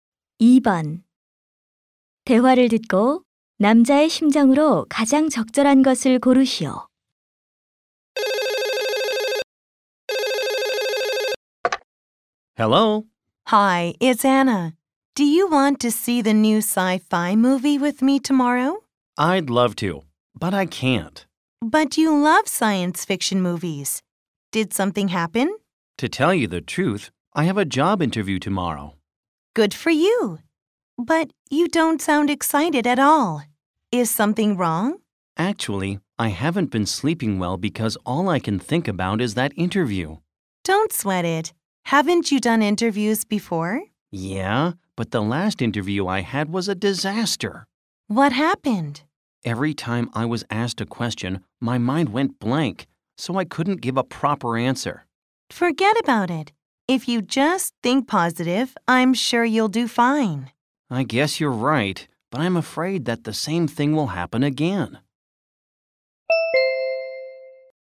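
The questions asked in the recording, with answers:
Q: 대화를 듣고 남자의 심정으로 가장 적절한 것을 고르시오.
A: 불안하고 초조함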